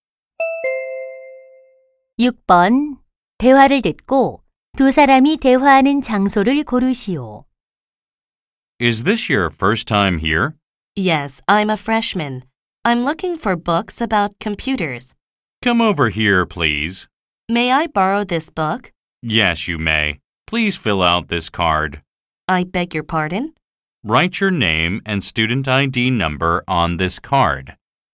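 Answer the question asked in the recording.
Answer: 도서관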